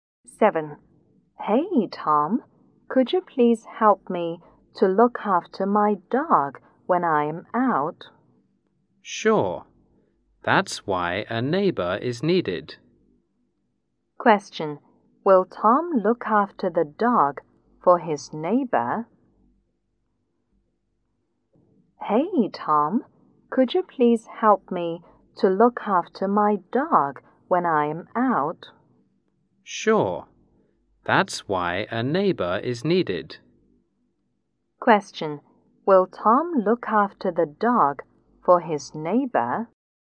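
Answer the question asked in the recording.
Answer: Yes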